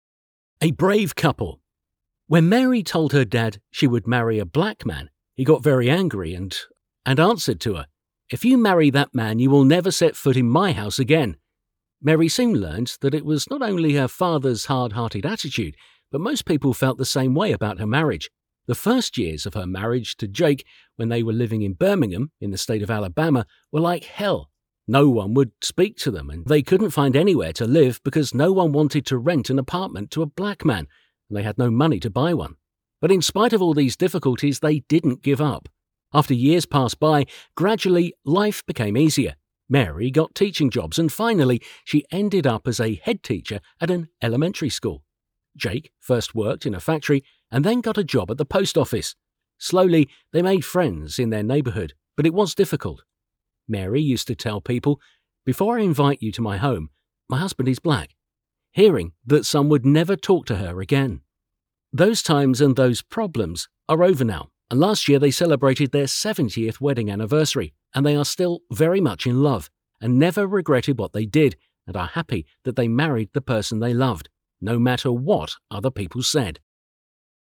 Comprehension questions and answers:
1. Why did Mary's father get angry?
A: Because she told him she would marry a black man.

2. What did he tell his daughter?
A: She will never set foot in his house again.

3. How did most people feel about her marriage?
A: The same way (as her father).

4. What were the first years of her marriage like?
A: Like hell.

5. Why was it difficult for her and her husband to find a home? (write two reasons).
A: Because no one wanted to rent an apartment to a black man and they had no money to buy one.

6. What jobs did they have?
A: Mary was a teacher and a head teacher, Jake worked in a factory and at the post office.

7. What happened last year?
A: They celebrated their 70th wedding anniversary.

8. Why are they happy?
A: Because they married the person they loved.

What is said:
A brave couple
When Mary told her dad she would marry a black man he got very angry and answered to her, "If you marry that man you will never set foot in my house again." Mary soon learned that it was not only her father's hard-hearted attitude, but most people felt the same way about her marriage. The first years of her marriage to Jake when they were living in Birmingham, in the state of Alabama were like hell – no one would speak to them and they couldn't find anywhere to live because no one wanted to rent an apartment to a black man, and they had no money to buy one. But in spite of all these difficulties they didn't give up.
As years passed by, gradually life became easier. Mary got teaching jobs, and finally, she ended up as a head teacher at an elementary school. Jake first worked in a factory and then got a job at the post office. Slowly they made friends in their neighbourhood, but it was difficult. Mary used to tell people, "Before I invite you to my home.... my husband is black." Hearing that some would never talk to her again.
Those times and those problems are over now and last year they celebrated their 70th wedding anniversary and they are still very much in love, and never regretted what they did and are happy that they married the person they loved, no matter what other people said.
A brave couple
8. Because they married the person they loved.

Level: B1/alapfok